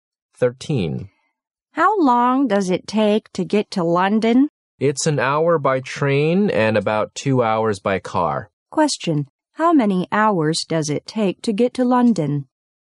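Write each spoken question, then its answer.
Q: how many hours does it take to get to London?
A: One hour by train, about two hours by car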